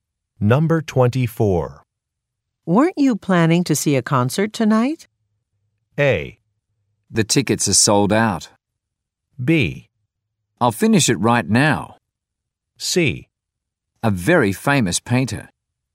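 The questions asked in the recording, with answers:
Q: Weren't you planning to see a concert tonight?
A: A: The tickets are sold out.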